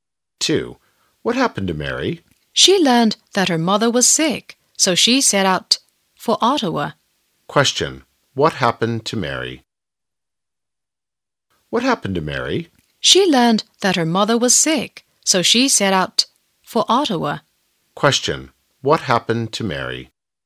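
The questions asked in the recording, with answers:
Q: What happened to Mary?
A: Her mother was sick, so she set out for Ottawa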